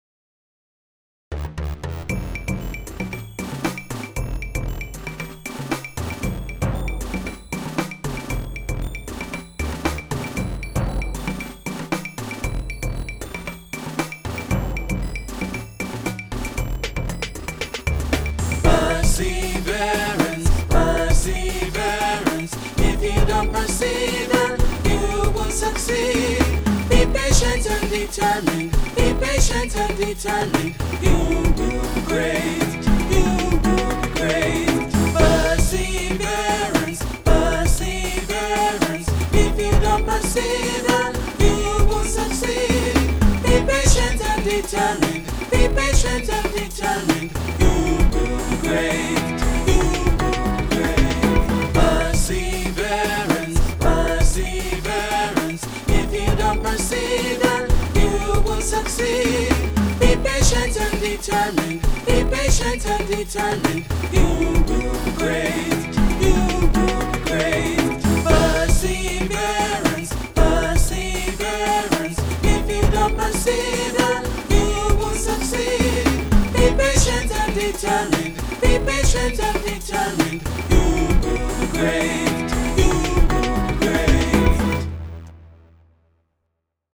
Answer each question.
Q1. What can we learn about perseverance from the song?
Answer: We will be great if we persevere. Patience is part of perseverance. Determination is part of perseverance.